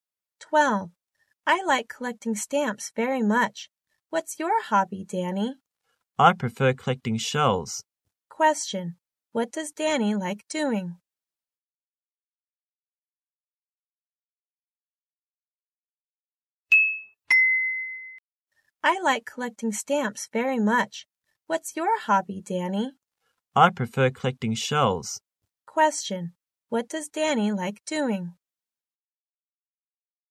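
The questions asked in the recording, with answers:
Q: What does Danny like doing?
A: Collecting shells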